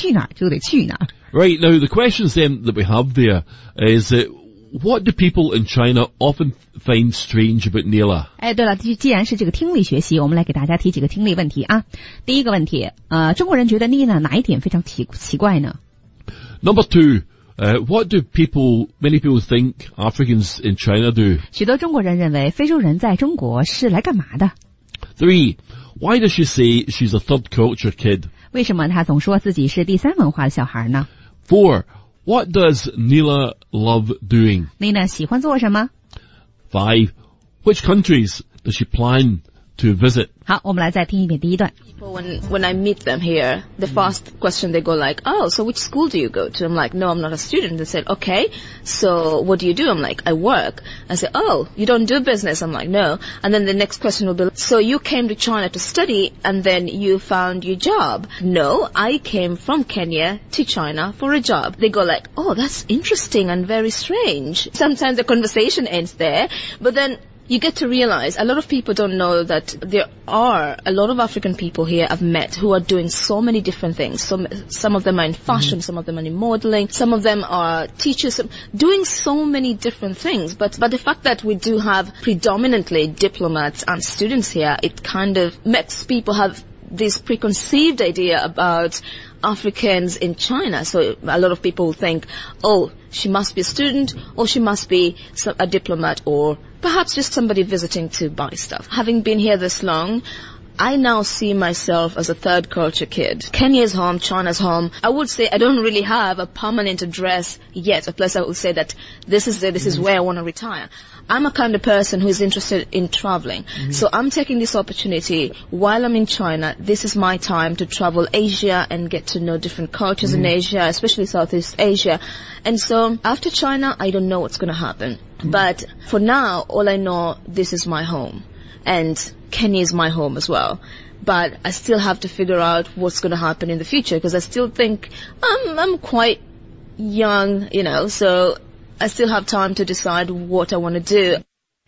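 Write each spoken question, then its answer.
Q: what do people in China often find strange about Nila?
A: That she came from Kenya to China for a job, not to study or do business

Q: what do many people think Africans in China do?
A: They are students or diplomats, or are visiting to buy stuff

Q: why does she say she's a third culture kid?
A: Both Kenya and China are home; she has no permanent address

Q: what does Nila love doing?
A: Traveling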